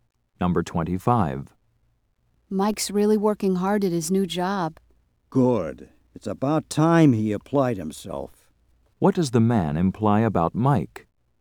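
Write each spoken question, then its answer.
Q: What does the man imply about Mike?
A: Mike didn't work hard before.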